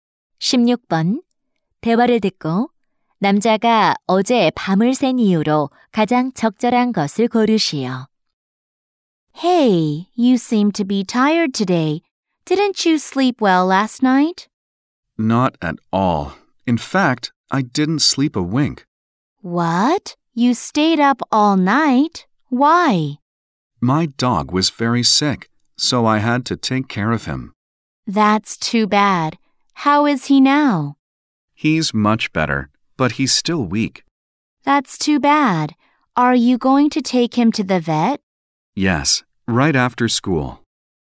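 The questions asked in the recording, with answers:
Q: 대화를 듣고 남자가 어제 밤을 샌 이유로 가장 적절한 것을 고르시오.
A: 아픈 개를 돌봐야 해서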